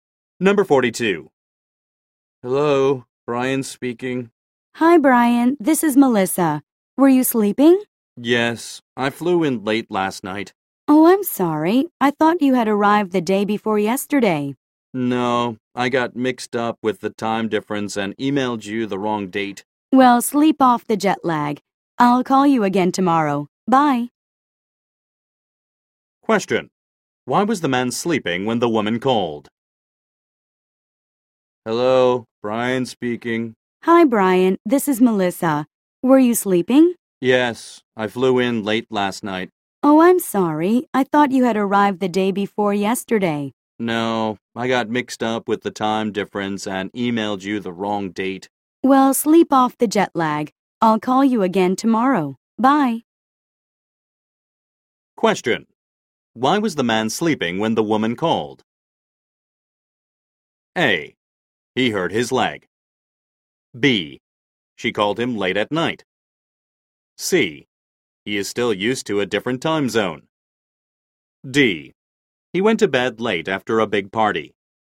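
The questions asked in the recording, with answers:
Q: Why was the man sleeping when the woman called?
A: C: He is still used to a different time zone.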